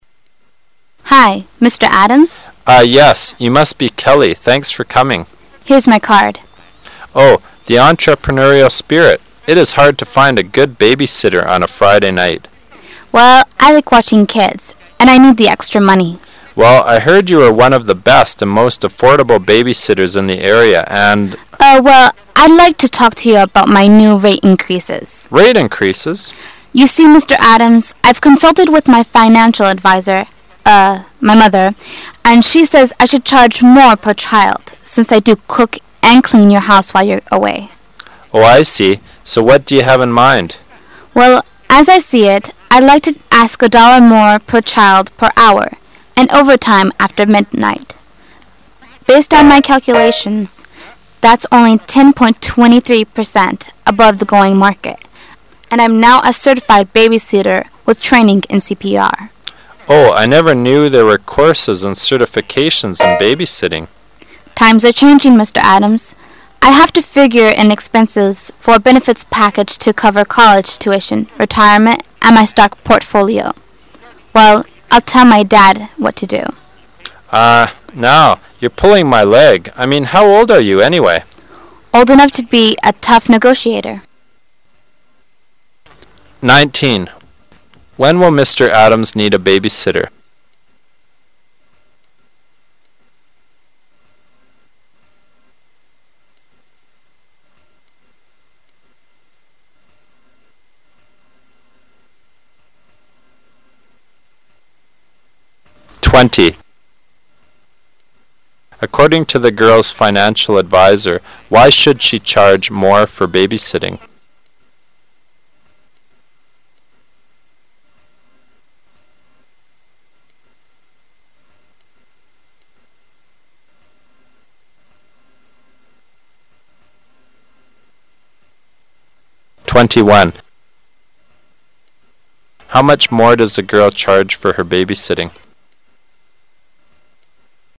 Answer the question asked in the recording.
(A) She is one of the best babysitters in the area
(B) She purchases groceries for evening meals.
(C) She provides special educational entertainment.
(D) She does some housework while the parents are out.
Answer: (D) She does some housework while the parents are out.

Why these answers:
原文重现。告示上说,为了保持飞机的负荷平衡,请勿占用此位。

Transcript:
You must be Kelly. Thanks for coming. W: Here's my card. M: Oh, the entrepreneurial spirit. It is hard to find a good babysitter on a Friday night. W: Well, I like watching kids, and I need the extra money. M: Well, I heard you were one of the best and most affordable babysitters in the area, and ... W: Uh, well, I'd like to talk to you about my new rate increases. M: Rate increases? W: You see, Mr. Adams. I've consulted with my financial advisor. Uh, my mother, and she says I should charge more per child since I do cook and clean your house while you're away. M: Oh, I see. So, what do you have in mind? W: Well, as I see it, I'd like to ask a dollar more per child per hour, and overtime after midnight. Based on my calculations, that's only 10.23% above the going market, and I'm now a certified babysitter with training in CPR. M: Oh, I never knew there were courses and certifications in babysitting. W: Times ate changing, Mr. Adams. I have to figure in expenses for a benefits package to cover college tuition, retirement, and my stock portfolio. Well, I tell my dad what to do. M: Ah now, you're pulling my leg. I mean, how old are you anyway? W: Old enough to be a tough negotiator. When will Mr. Adams need a babysitter?